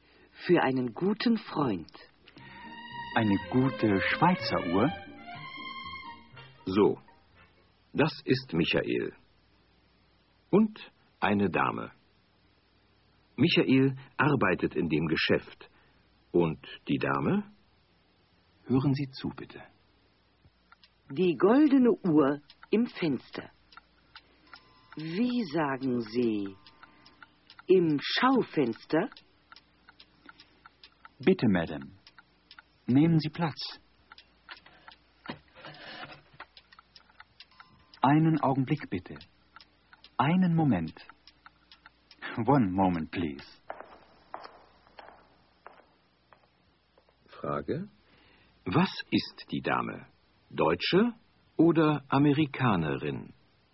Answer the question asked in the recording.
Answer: Sie ist Amerikanerin.